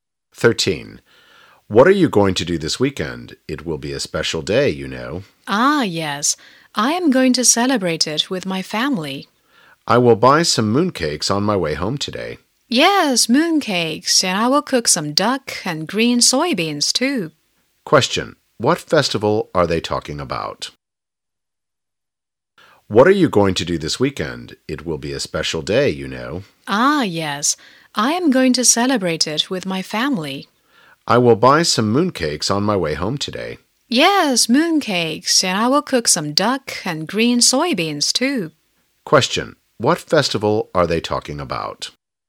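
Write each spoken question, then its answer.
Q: What festival are they talking about?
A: The Mid-Autumn Festival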